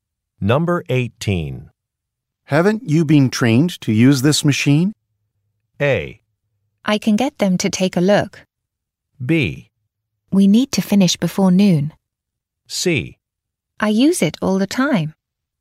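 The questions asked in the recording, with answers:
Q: Haven't you been trained to use this machine?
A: C: I use it all the time.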